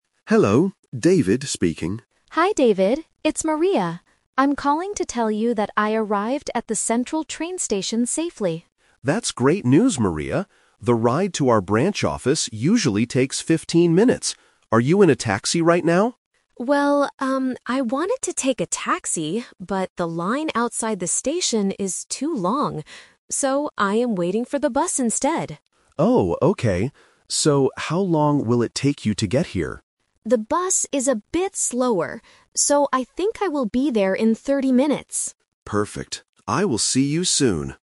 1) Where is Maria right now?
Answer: At the train station.

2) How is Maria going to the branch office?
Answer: By bus.

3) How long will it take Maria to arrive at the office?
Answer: 30 minutes.

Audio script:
David: Hello, David speaking.
Maria: Hi David, it's Maria. I'm calling to tell you that I arrived at the central train station safely.
David: That's great news, Maria. The ride to our branch office usually takes 15 minutes. Are you in a taxi right now?
Maria: Well, um, I wanted to take a taxi, but the line outside the station is too long. So, I am waiting for the bus instead.
David: Oh, okay. So, how long will it take you to get here?
Maria: The bus is a bit slower, so I think I will be there in 30 minutes.